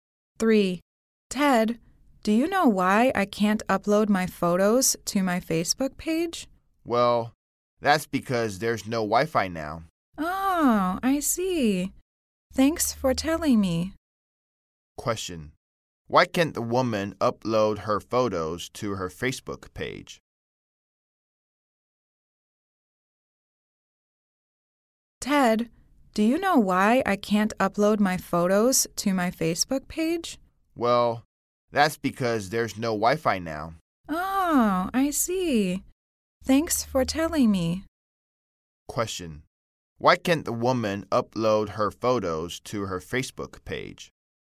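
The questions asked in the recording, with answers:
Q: Why can't the woman upload her photos to her Facebook page?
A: There's no Wi-Fi now.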